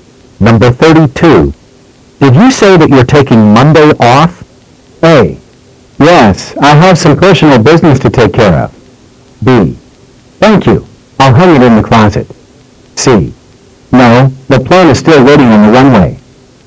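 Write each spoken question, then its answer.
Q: Did you say that you're taking Monday off?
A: A: Yes, I have some personal business to take care of.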